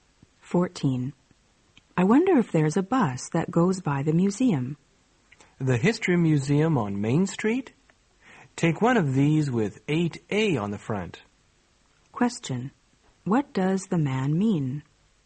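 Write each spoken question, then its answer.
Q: What does the man mean?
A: The woman should take a bus marked 8A.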